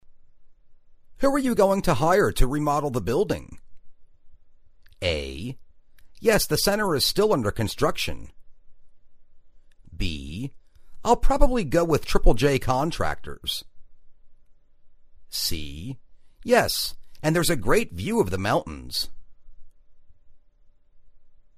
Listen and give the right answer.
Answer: I'll probably go with Triple-J Contractors.